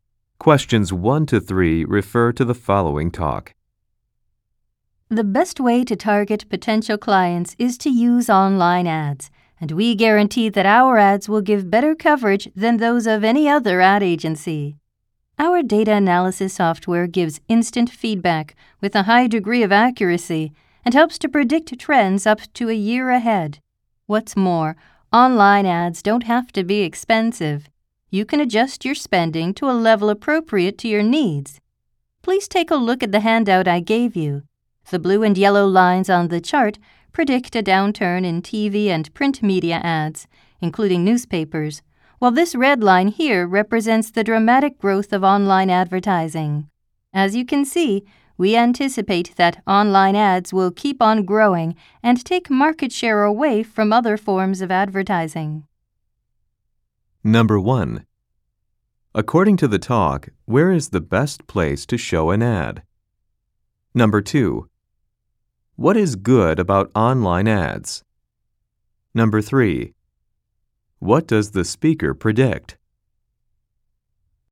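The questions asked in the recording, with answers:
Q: According to the talk, where is the best place to show an ad?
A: Online

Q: What does the speaker predict?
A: Online ads will keep growing and take market share from TV and print ads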